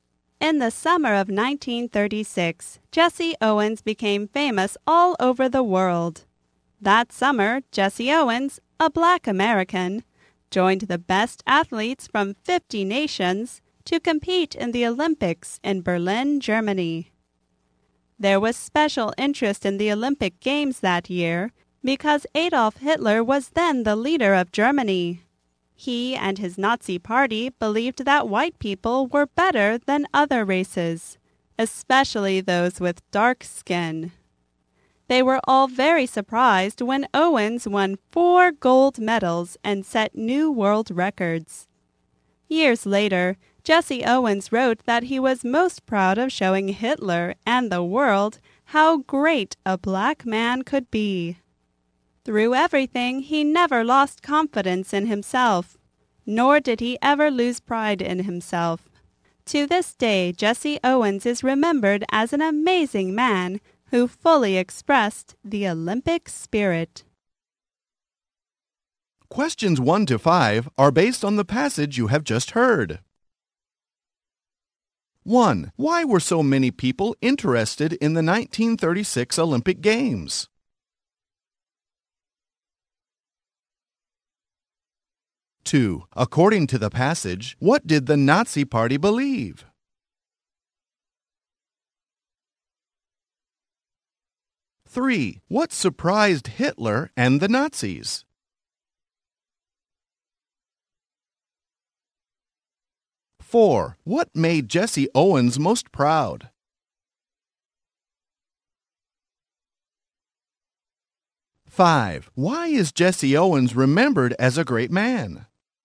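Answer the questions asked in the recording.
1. Hitler was then the leader of Germany
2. White people were better than other races
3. Owens won 4 gold medals and set new world records
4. Showing Hitler and the world how great a black man could be
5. He never lost confidence or pride and fully expressed the Olympic spirit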